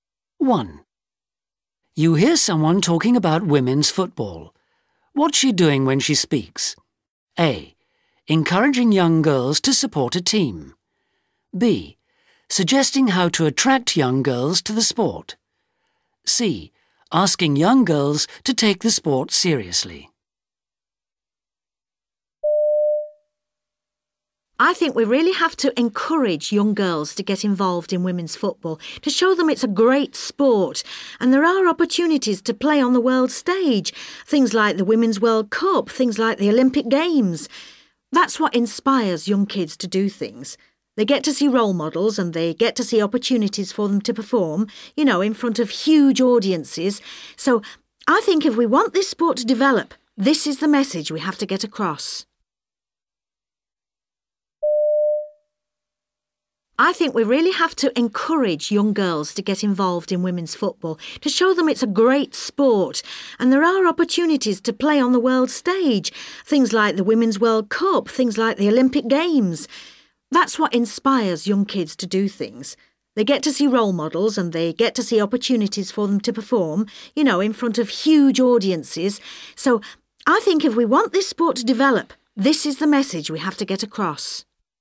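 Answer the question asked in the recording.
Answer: B: Suggesting how to attract young girls to the sport.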